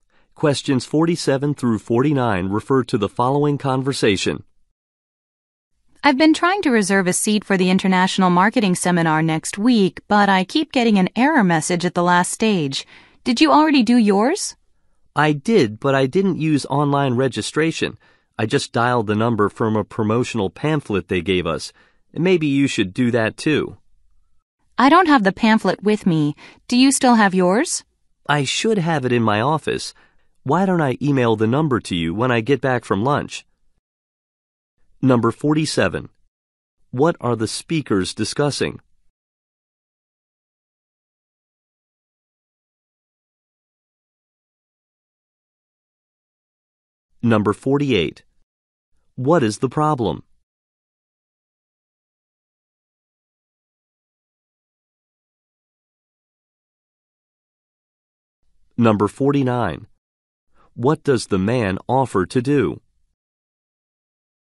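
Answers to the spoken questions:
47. Registering for a marketing seminar
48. Online registration keeps giving an error message
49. Email the phone number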